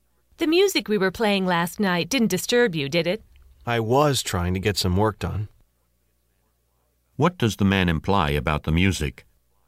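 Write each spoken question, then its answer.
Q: What does the man imply about the music?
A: It disturbed him while he was trying to work.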